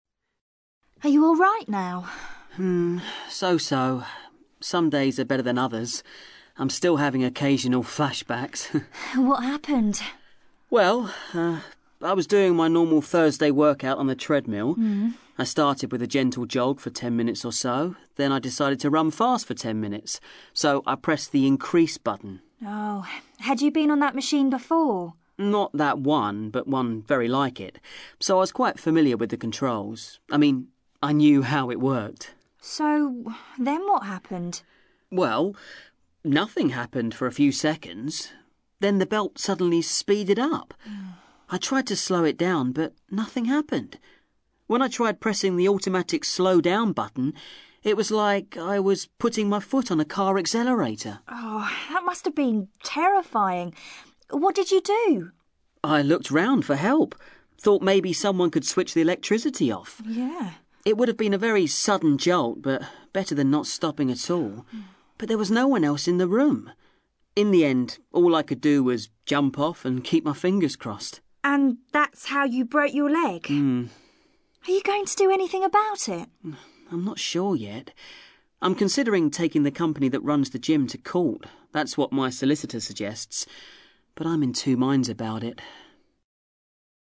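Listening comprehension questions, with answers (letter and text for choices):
You are going to hear two people, Harry and Jasmine, talking about an incident at a gym. For questions 1-2, choose the answer (A, B or C) which fits best according to what you hear. Click the speaker to listen (maximum: twice). Then check the audio transcription and the answers.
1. What condition is Harry in now?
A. His leg is still very painful.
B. He sometimes relives the experience.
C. He has recovered completely.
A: B. He sometimes relives the experience.

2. What is Harry planning to do in relation to the incident?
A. He is trying to forget the whole thing.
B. He is taking legal action against the gym company.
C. He hasn't made his mind up yet.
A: C. He hasn't made his mind up yet.

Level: CPE Proficiency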